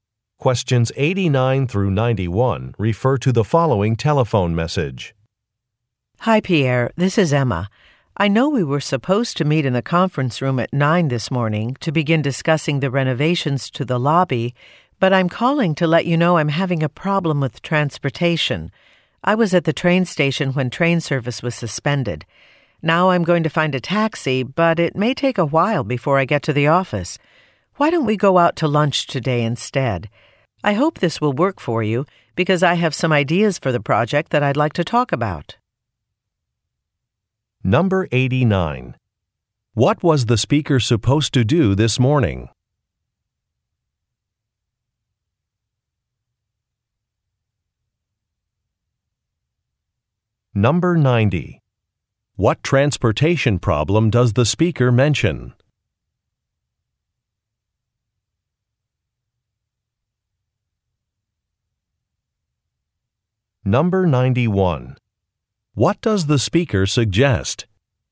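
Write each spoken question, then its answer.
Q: What was the speaker supposed to do this morning?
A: Meet to discuss the lobby renovations

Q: What transportation problem does the speaker mention?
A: Train service was suspended

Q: What does the speaker suggest?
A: Going out to lunch instead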